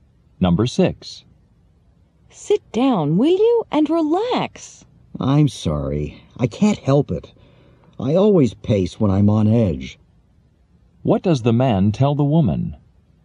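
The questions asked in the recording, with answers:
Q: What does the man tell the woman?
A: He walks back and forth when he is nervous.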